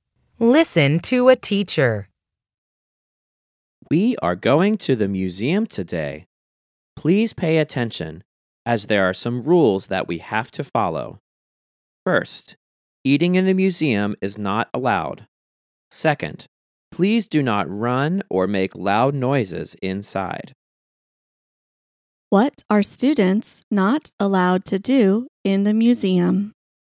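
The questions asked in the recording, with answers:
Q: What are students not allowed to do in the museum?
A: Eat, run or make loud noises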